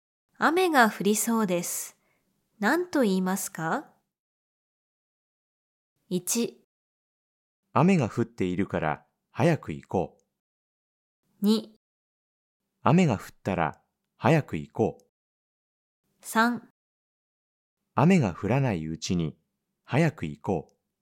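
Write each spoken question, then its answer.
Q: 雨が降りそうです。何と言いますか?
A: 3: 雨が降らないうちに早く行こう。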